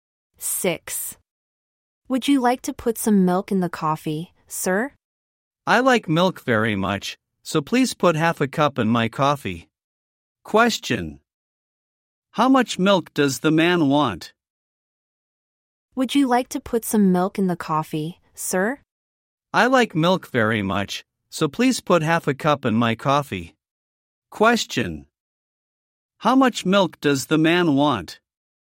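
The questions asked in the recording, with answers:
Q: How much milk does the man want?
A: Half a cup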